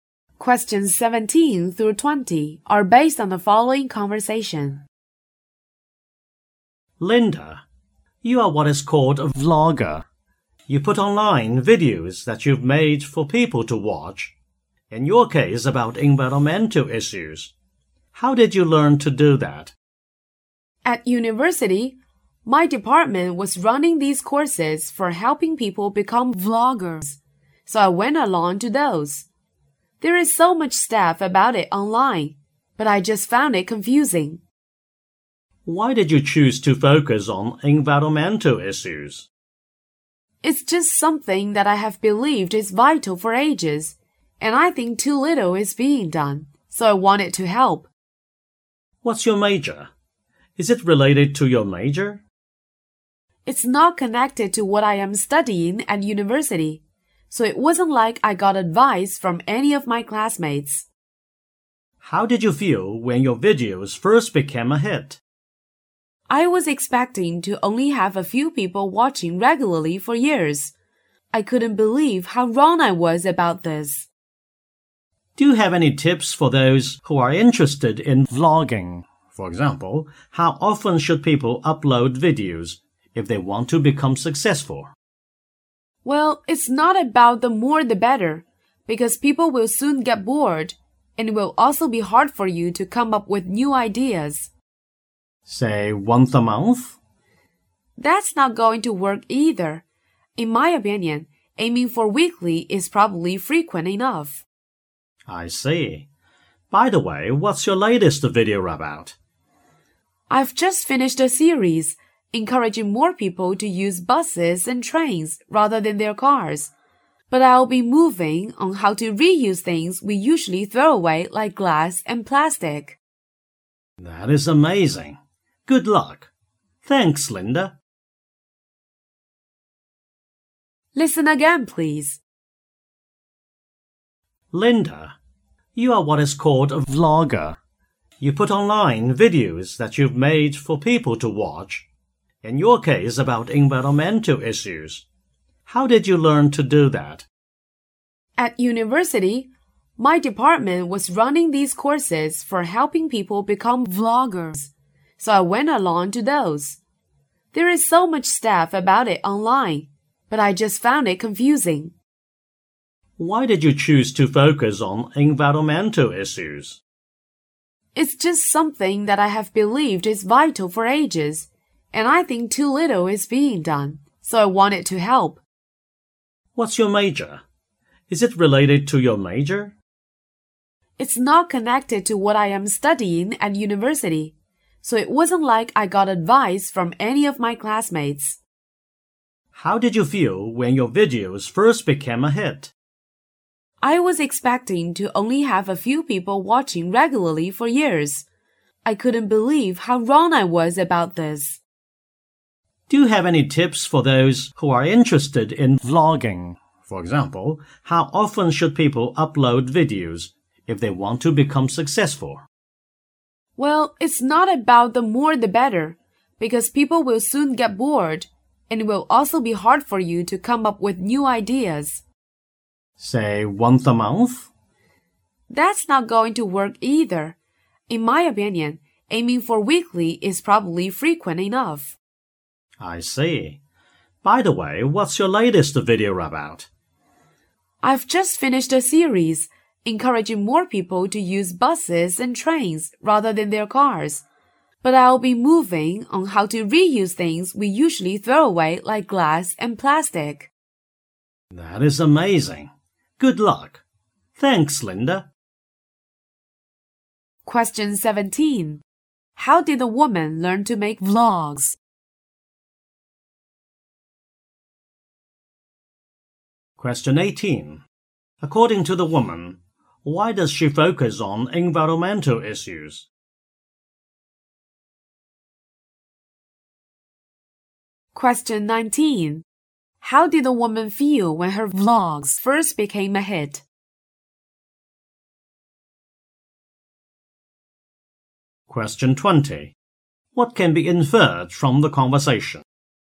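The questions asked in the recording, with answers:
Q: How did the woman learn to make vlogs?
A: By taking courses run by her university department

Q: According to the woman, why does she focus on environmental issues?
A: She thinks they are vital and too little is being done

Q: How did the woman feel when her vlogs first became a hit?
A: Surprised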